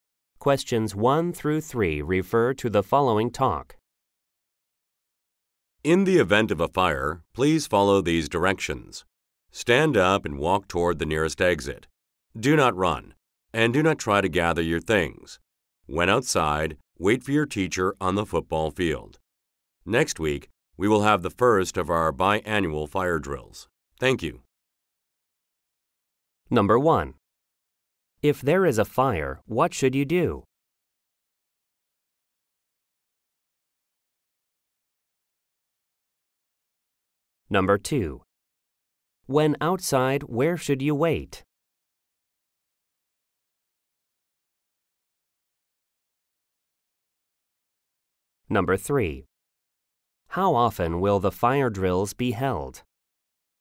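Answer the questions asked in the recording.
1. Stand up and walk toward the nearest exit
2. On the football field
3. Twice a year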